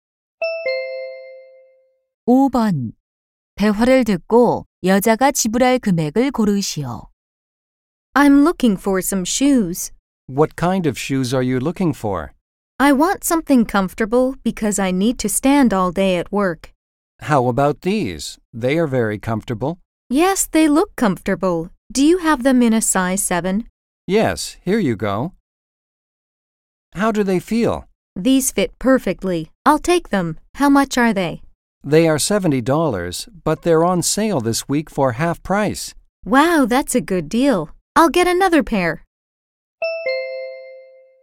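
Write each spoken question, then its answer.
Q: 대화를 듣고 여자가 지불할 금액을 고르시오.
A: $70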